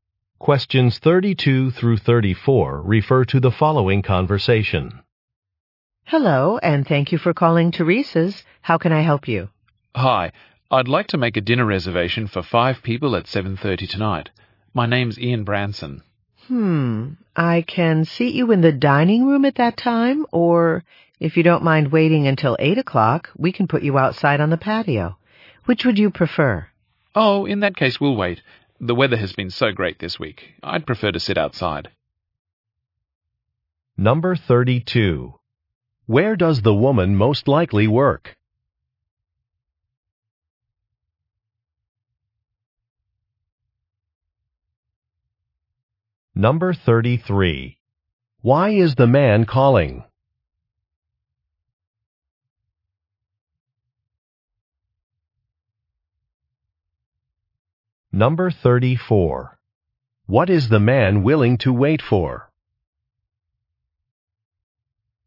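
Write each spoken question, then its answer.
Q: Where does the woman most likely work?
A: At a restaurant

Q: Why is the man calling?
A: To make a dinner reservation

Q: What is the man willing to wait for?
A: A table outside on the patio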